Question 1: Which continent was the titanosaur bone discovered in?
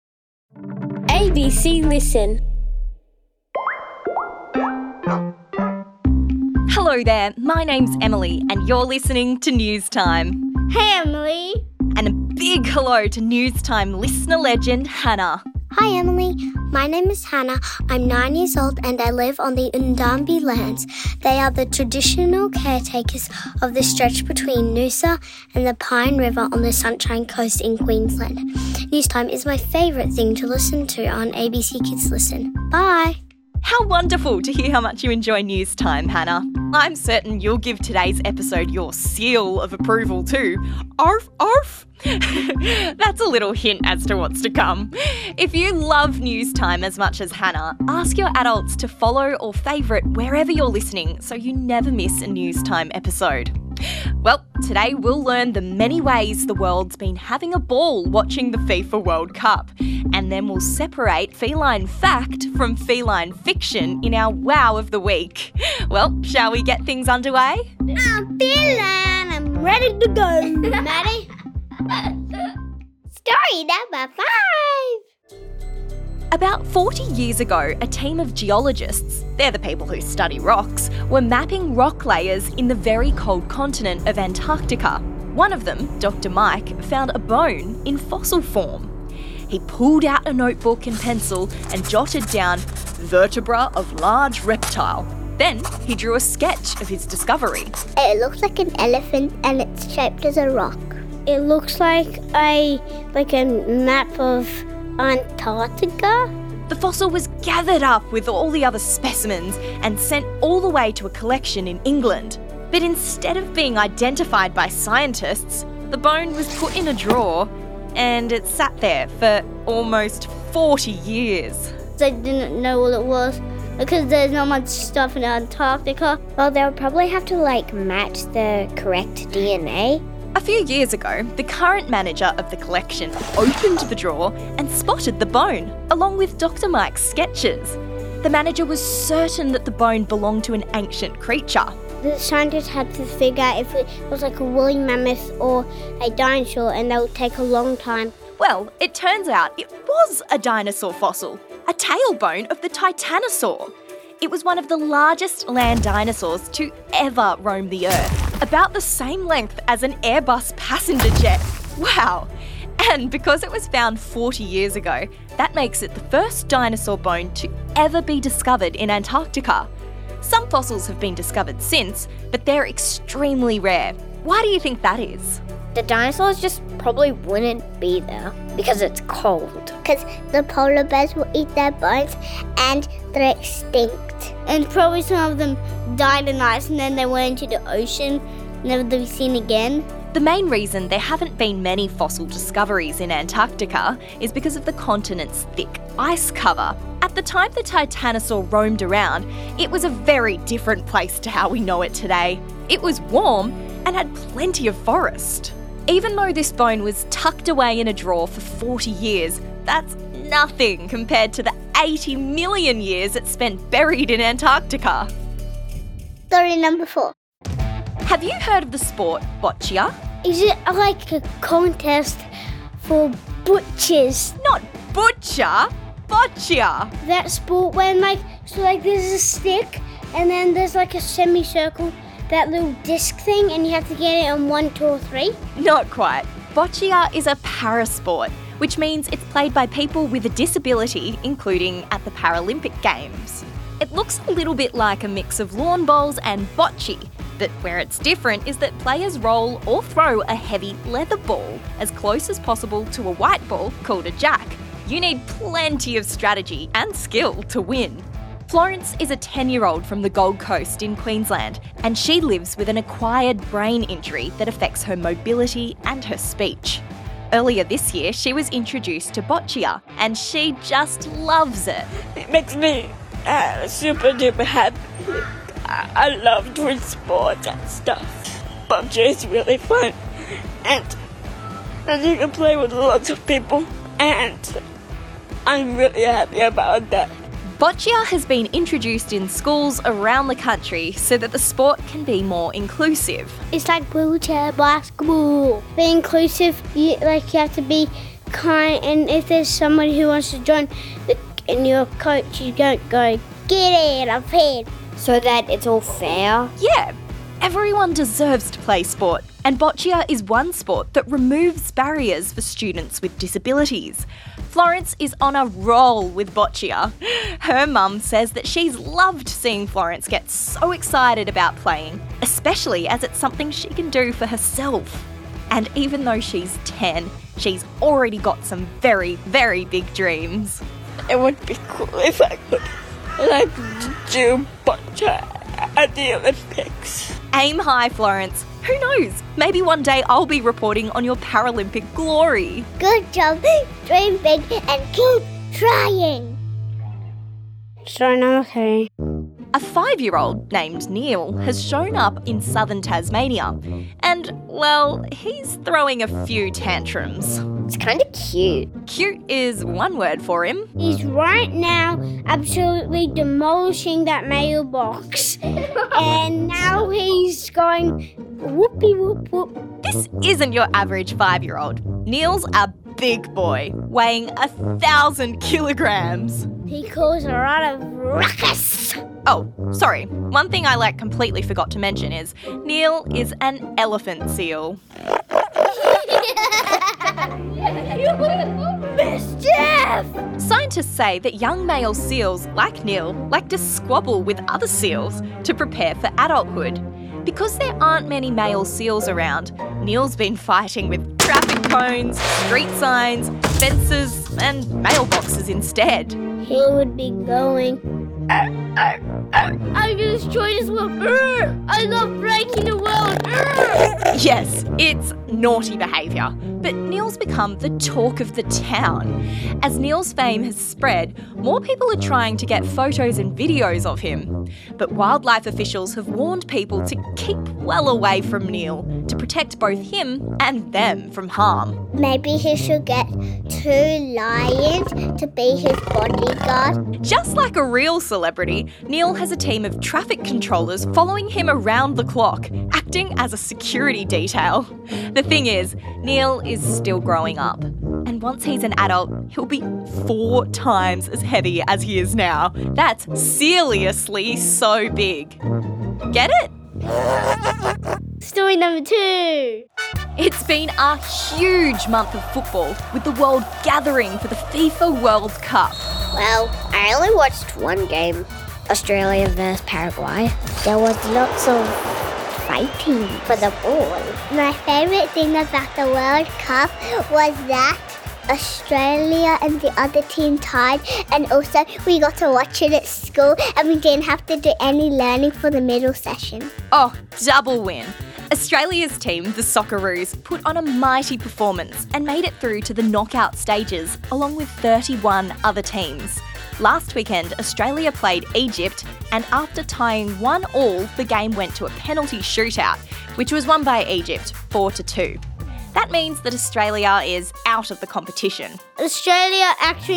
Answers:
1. Antarctica